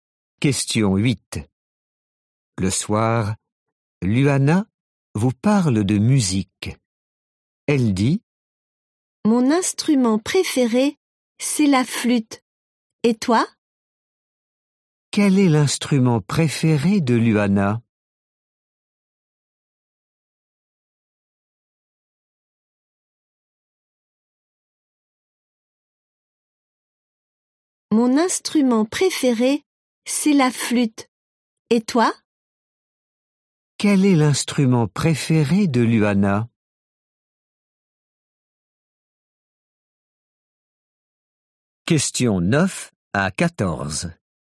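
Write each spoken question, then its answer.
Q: Quel est l'instrument préféré de Luana ?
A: La flûte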